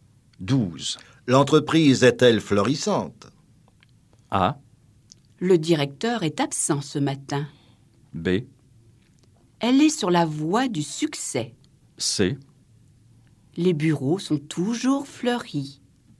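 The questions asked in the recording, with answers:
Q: L'entreprise est-elle florissante?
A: B: Elle est sur la voie du succès.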